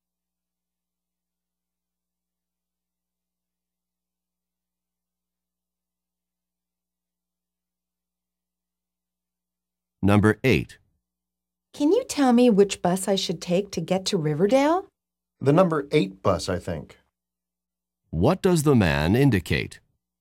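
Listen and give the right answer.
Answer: He thinks the number 8 bus goes to Riverdale, but he is not sure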